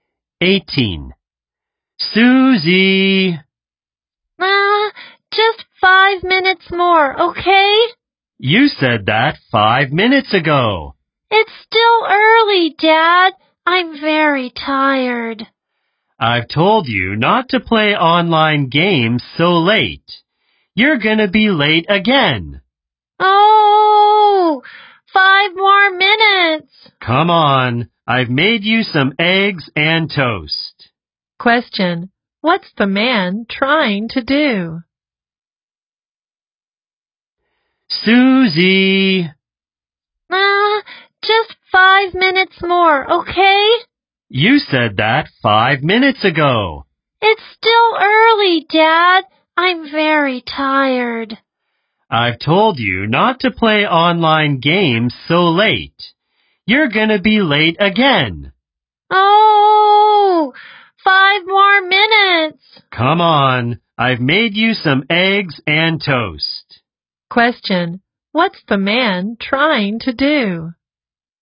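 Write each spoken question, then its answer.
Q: Question, what's the man trying to do?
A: Wake Susie up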